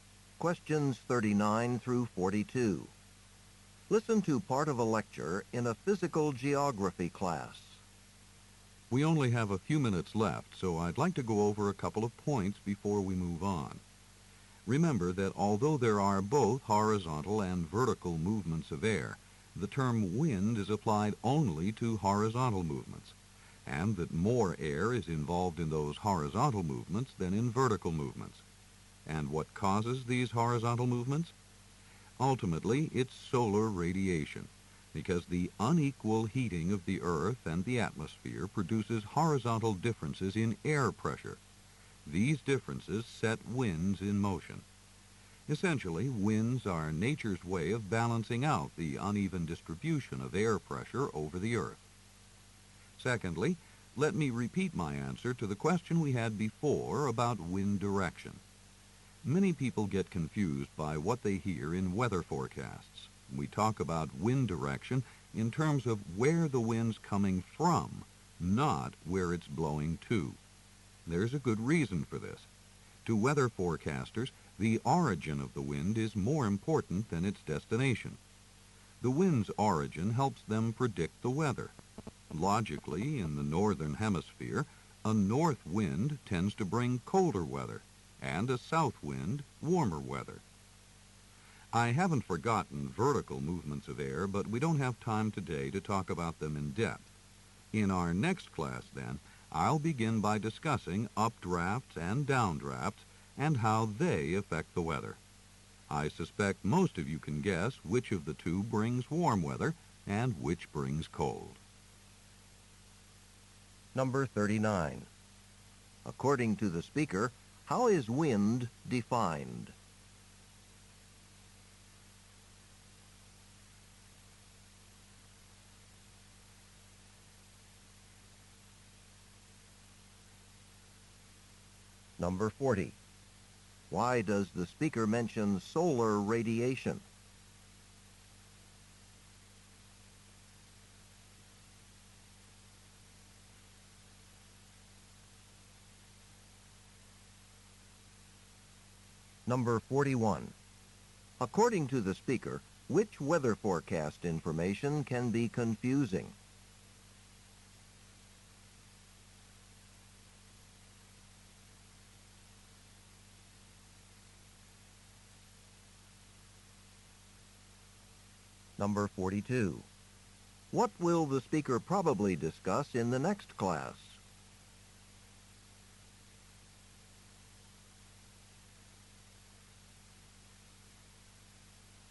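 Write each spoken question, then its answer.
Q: According to the speaker, how is wind defined?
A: As horizontal movement of air

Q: Why does the speaker mention solar radiation?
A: It is the ultimate cause of wind, through air pressure differences

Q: According to the speaker, which weather forecast information can be confusing?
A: Wind direction

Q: What will the speaker probably discuss in the next class?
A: Vertical air movements: updrafts and downdrafts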